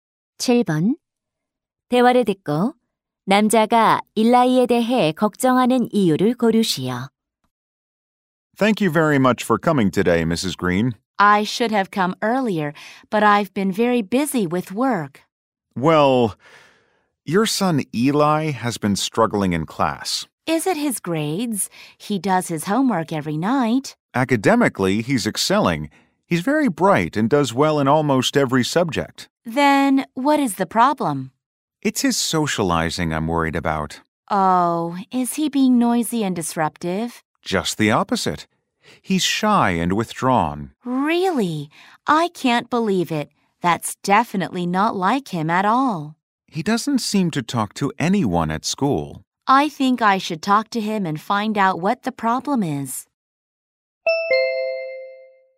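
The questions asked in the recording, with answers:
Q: 대화를 듣고 남자가 일라이에 대해 걱정하는 이유를 고르시오.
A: 수줍어하고 내성적이어서 학교에서 아무와도 이야기하지 않기 때문에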